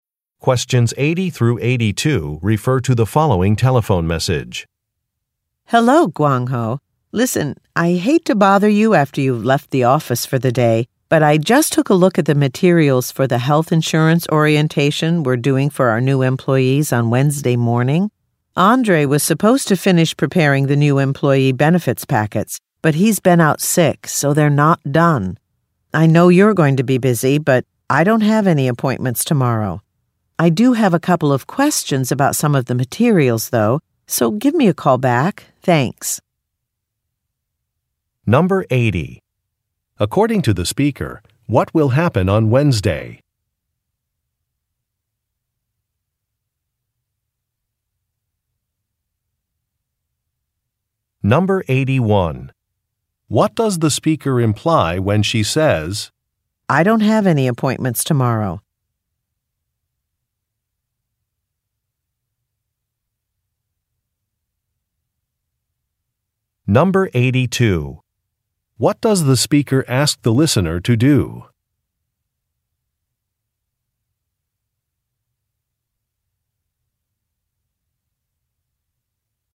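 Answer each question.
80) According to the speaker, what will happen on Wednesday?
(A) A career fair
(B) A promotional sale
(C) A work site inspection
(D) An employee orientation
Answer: An employee orientation

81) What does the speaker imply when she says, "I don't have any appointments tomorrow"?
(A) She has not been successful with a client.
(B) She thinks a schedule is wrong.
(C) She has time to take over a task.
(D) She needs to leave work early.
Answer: She has time to take over a task.

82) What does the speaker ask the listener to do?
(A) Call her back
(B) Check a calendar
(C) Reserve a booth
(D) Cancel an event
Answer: Call her back

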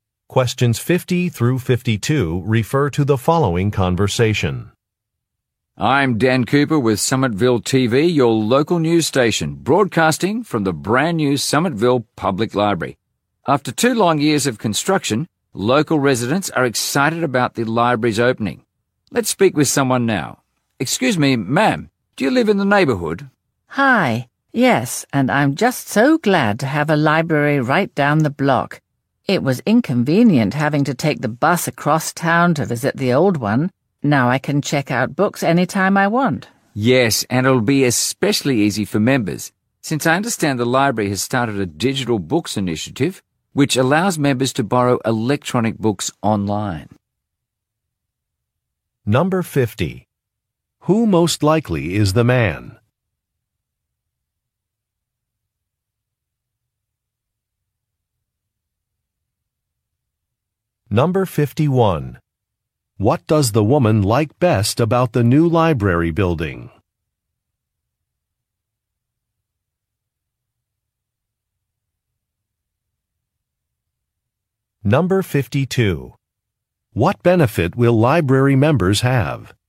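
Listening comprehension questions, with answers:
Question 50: Who most likely is the man?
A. A librarian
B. A teacher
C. A news reporter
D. A local politician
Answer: A news reporter

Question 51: What does the woman like best about the new library building?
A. Its modern appearance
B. Its convenient location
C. Its operating hours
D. Its large book collection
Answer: Its convenient location

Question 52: What benefit will library members have?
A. Free parking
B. Discounts on special classes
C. Access to electronic books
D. Tickets to local museums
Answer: Access to electronic books

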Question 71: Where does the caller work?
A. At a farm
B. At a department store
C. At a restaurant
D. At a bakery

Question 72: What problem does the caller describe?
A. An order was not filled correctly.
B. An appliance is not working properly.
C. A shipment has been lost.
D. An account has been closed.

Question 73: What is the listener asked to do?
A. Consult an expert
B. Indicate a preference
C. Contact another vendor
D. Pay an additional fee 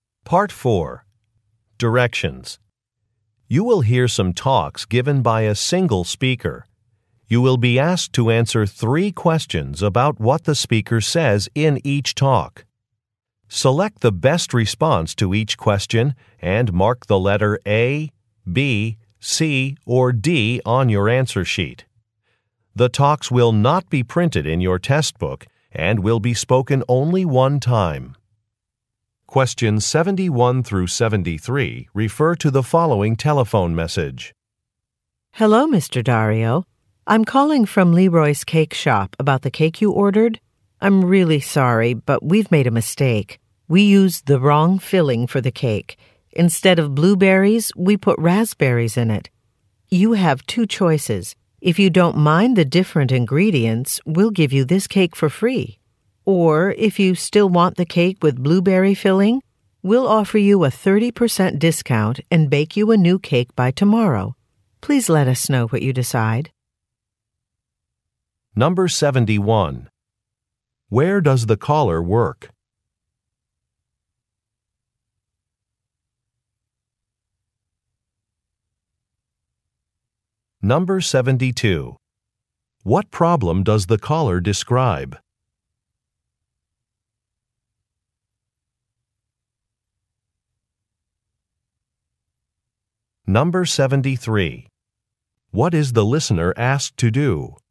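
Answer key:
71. At a bakery
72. An order was not filled correctly.
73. Indicate a preference

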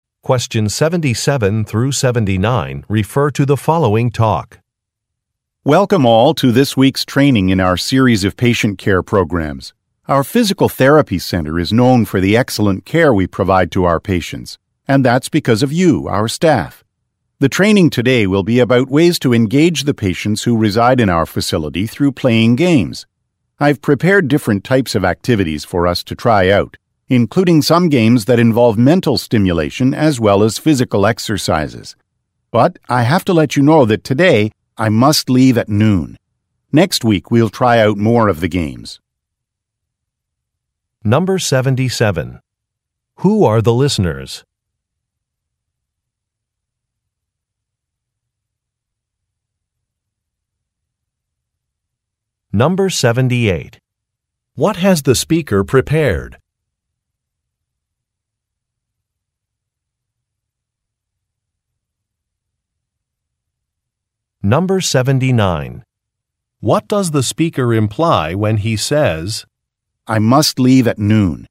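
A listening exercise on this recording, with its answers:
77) Who are the listeners?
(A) Hotel receptionists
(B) Health-care staff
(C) Customer-service representatives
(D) Fitness trainers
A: Health-care staff

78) What has the speaker prepared?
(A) Activities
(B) Food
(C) Certificates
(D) A video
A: Activities

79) What does the speaker imply when he says, "I must leave at noon"?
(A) He would like permission to leave.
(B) He cannot join a luncheon.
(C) A colleague will fill in for him.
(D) Some material will not be covered today.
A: Some material will not be covered today.

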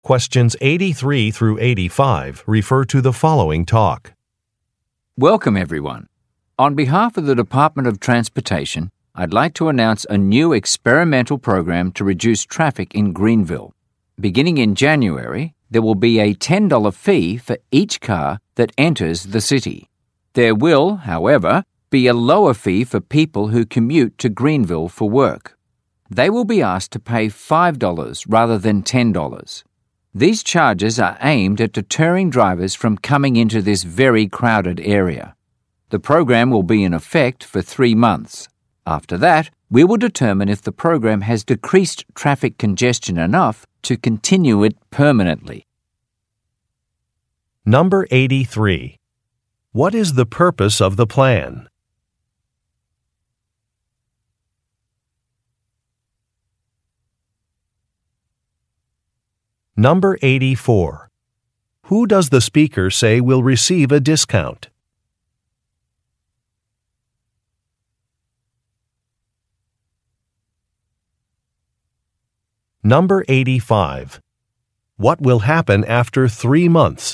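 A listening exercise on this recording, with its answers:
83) What is the purpose of the plan?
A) To support local businesses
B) To promote tourism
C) To decrease traffic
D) To reduce government spending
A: To decrease traffic

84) Who does the speaker say will receive a discount?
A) Commuters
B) Senior citizens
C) Students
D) City officials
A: Commuters

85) What will happen after three months?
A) A survey will be distributed.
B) A new director will take over.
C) A bus line will be added.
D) A program evaluation will take place.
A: A program evaluation will take place.

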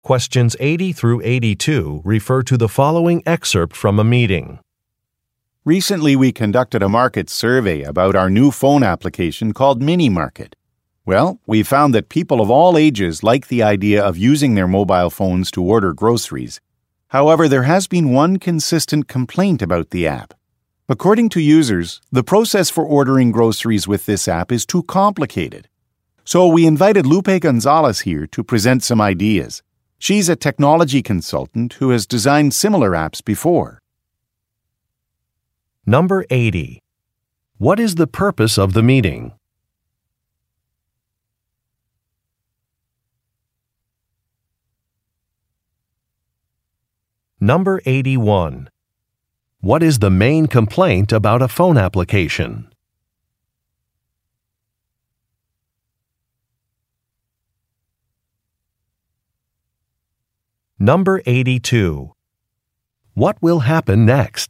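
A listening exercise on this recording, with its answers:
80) What is the purpose of the meeting?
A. To delegate projects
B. To introduce a client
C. To organize a seminar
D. To present survey results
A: To present survey results

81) What is the main complaint about a phone application?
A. It is slow.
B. It is unattractive.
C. It is hard to use.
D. It has high fees.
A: It is hard to use.

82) What will happen next?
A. Lunch will be delivered.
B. A schedule will be finalized.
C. A consultant will make a presentation.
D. Team members will test a new product.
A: A consultant will make a presentation.

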